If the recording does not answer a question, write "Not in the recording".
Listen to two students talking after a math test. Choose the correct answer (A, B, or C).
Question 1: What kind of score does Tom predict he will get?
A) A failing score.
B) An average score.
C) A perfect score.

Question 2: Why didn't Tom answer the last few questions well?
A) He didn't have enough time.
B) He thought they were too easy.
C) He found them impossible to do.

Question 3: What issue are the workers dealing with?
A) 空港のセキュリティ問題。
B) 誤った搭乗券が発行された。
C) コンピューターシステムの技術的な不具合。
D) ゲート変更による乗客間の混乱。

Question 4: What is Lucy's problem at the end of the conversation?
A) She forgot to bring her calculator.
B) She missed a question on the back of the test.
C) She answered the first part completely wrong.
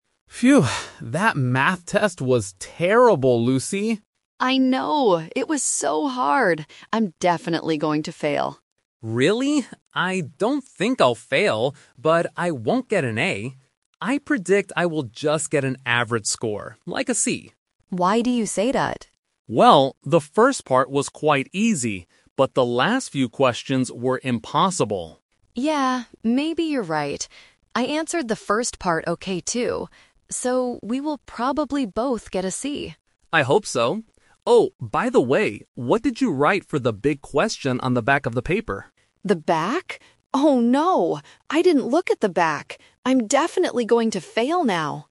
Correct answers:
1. B
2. C
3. Not in the recording
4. B

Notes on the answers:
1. Tom explicitly says, "I predict I will just get an average score, like a C." Trap: Option (A) is a "Person Trap" because Lucy is the one who originally predicts she will fail. Option (C) is the opposite of what he predicts (he says "I won't get an A").
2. Tom says, "...but the last few questions were impossible." Trap: Option (B) is a trap because the first part was easy, not the last part. Option (A) is a plausible reason for not finishing a test, but it is never mentioned in the audio.
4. Tom asks about the question on the back, and Lucy panics: "The back? Oh no! I didn't look at the back!" Trap: Option (C) is a trap because Lucy actually says she answered the first part "okay". Option (A) is not mentioned in the audio at all.

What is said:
Tom: Phew! That math test was terrible, Lucy.
Lucy: I know! It was so hard. I'm definitely going to fail.
Tom: Really? I don't think I'll fail, but I won't get an A. I predict I will just get an average score, like a C.
Lucy: Why do you say that?
Tom: Well, the first part was quite easy, but the last few questions were impossible.
Lucy: Yeah, maybe you're right. I answered the first part okay too. So, we will probably both get a C.
Tom: I hope so. Oh, by the way, what did you write for the big question on the back of the paper?
Lucy: The back? Oh no! I didn't look at the back!

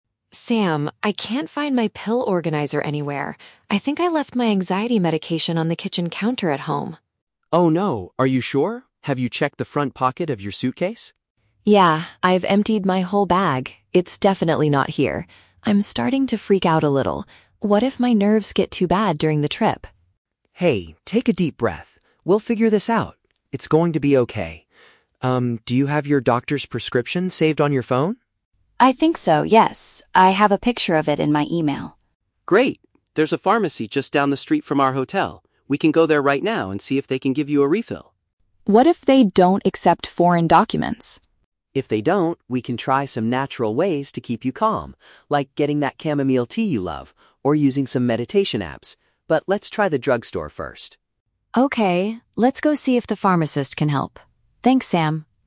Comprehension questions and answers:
Listen to the conversation between two friends on a trip and choose the correct answer (A, B, or C) for each question.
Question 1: What is Emma's main problem?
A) She lost her travel suitcase at the airport.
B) She feels sick because of the long flight.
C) She forgot to bring her pills from home.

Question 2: What does Sam suggest they do FIRST?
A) Drink some herbal tea to relax.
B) Visit a local shop to buy more medicine.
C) Call her doctor to get a new prescription.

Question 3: What is Emma worried about regarding the pharmacy?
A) It might be too far from their hotel.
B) They might not accept her medical paper.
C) They will not have the exact same brand of medicine.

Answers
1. C
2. B
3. B

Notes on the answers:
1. The Key: Emma says, "I left my anxiety medication on the kitchen counter at home." Medication is another word for pills. The Trap (A): Sam asks if she checked her "suitcase," but she didn't lose it; she just couldn't find the medicine inside it. Plausible but not mentioned (B): Feeling sick after a flight is a common travel problem, but it is not mentioned in the audio.
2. The Key: Sam says, "There's a pharmacy just down the street... We can go there right now." A pharmacy is a local shop for medicine. The Trap (A): Sam mentions "chamomile tea", but this is his backup plan if the pharmacy doesn't work out. He clearly says, "let's try the drug store first." Plausible but not mentioned (C): They talk about the doctor's prescription she has on her phone, but Sam never suggests making a phone call to her doctor.
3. The Key: Emma asks, "What if they don't accept foreign documents?" Her "doctor's prescription" is the medical paper. The Trap (A): The pharmacy is actually very close ("just down the street from our hotel"), so distance is not her concern. Plausible but not mentioned (C): Worrying about the brand is a logical fear for a traveler, but Emma does not express this specific worry in the conversation.

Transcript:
Emma: Sam, I can't find my pill organizer anywhere. I think I left my anxiety medication on the kitchen counter at home!
Sam: Oh no, are you sure? Have you checked the front pocket of your suitcase?
Emma: Yeah, I've emptied my whole bag. It's definitely not here. I'm starting to freak out a little. What if my nerves get too bad during the trip?
Sam: Hey, take a deep breath. We'll figure this out. It's going to be okay. Um, do you have your doctor's prescription saved on your phone?
Emma: I think so, yes. I have a picture of it in my email.
Sam: Great. There's a pharmacy just down the street from our hotel. We can go there right now and see if they can give you a refill.
Emma: What if they don't accept foreign documents?
Sam: If they don't, we can try some natural ways to keep you calm, like getting that chamomile tea you love, or using some meditation apps.

